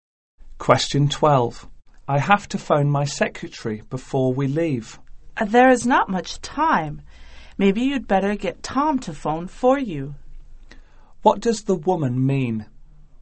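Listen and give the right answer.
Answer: Tom should phone the secretary for him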